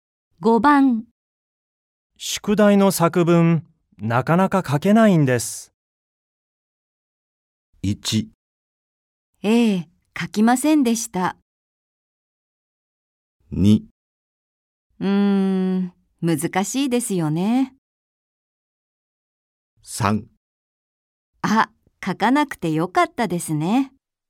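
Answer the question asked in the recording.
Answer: 2: 難しいですよね。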